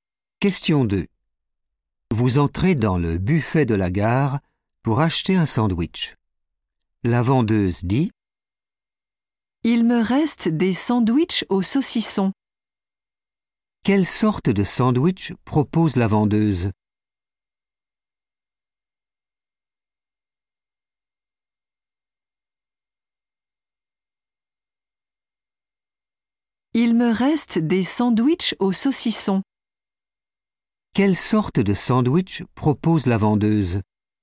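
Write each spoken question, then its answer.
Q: Quelle sorte de sandwich propose la vendeuse ?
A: sandwich au saucisson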